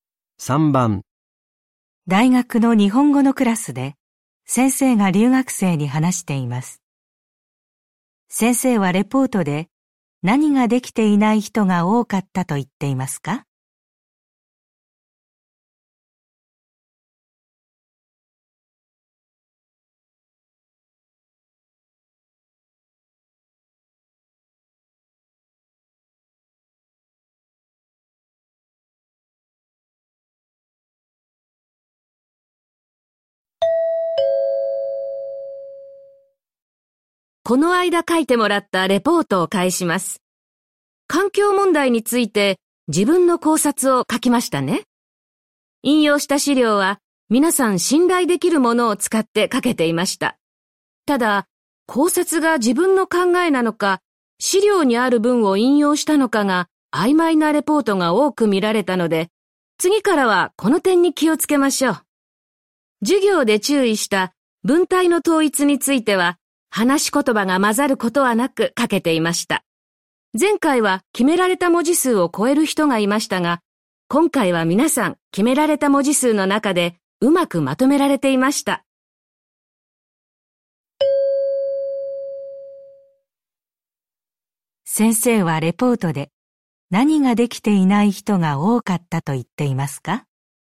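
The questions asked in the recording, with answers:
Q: 先生はレポートで何ができていない人が多かったと言っていますか?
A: 自分の考えと資料の引用の区別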